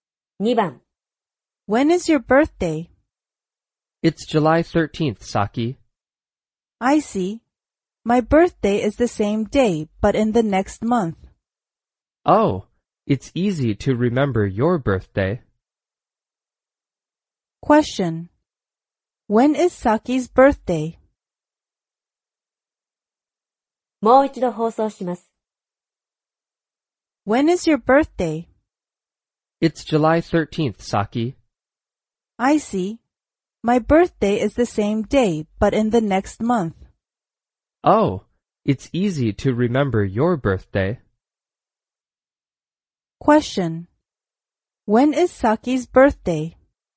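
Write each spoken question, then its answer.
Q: When is Saki's birthday?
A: August 13th.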